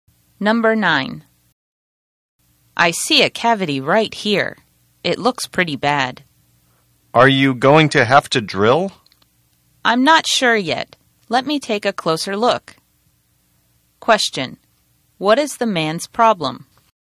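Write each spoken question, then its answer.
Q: What is the man's problem?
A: He has a bad cavity in his tooth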